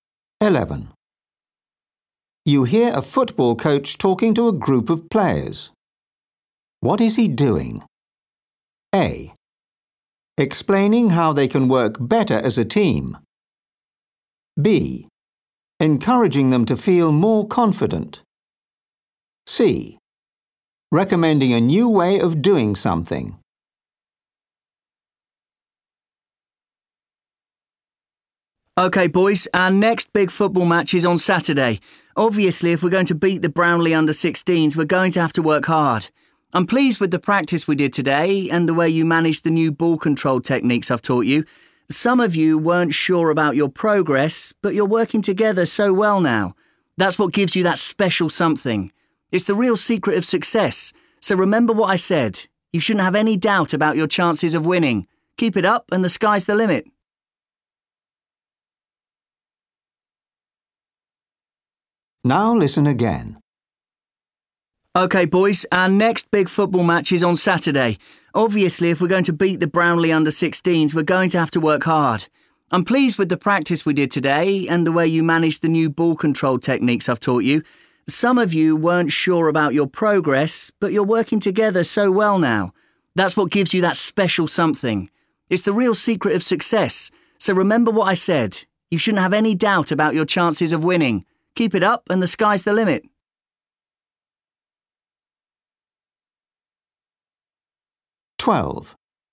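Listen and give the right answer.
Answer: B: Encouraging them to feel more confident.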